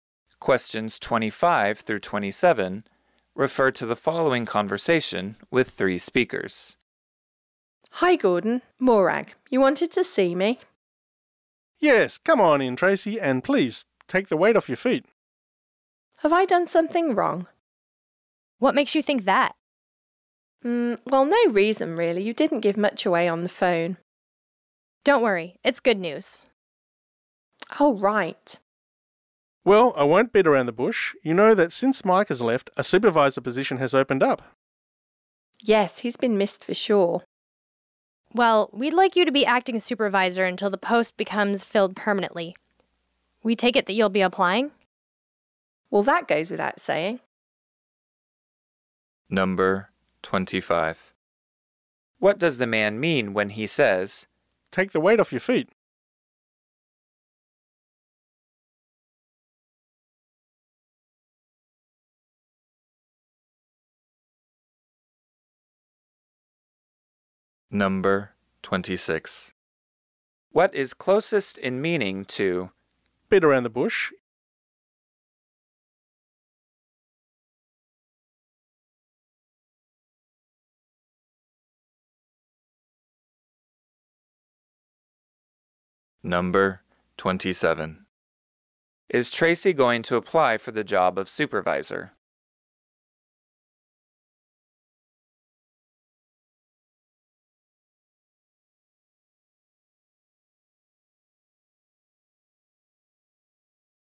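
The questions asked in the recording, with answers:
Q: What does the man mean when he says, "Take the weight off your feet"?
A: Sit down

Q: What is closest in meaning to "beat around the bush"?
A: Avoid getting to the point

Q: Is Tracy going to apply for the job of supervisor?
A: Yes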